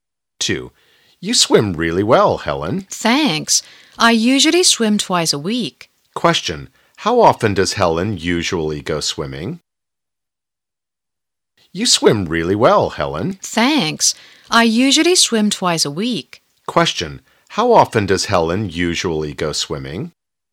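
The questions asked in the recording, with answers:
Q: How often does Helen usually go swimming?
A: Twice a week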